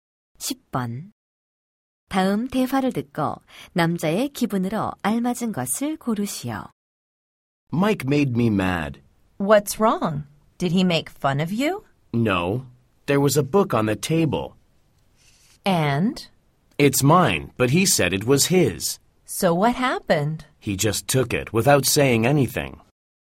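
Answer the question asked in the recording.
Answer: 화남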